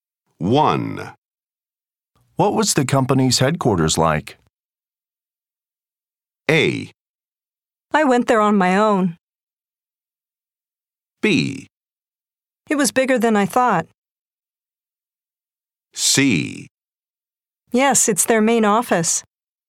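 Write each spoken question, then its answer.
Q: What was the company's headquarters like?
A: B: It was bigger than I thought.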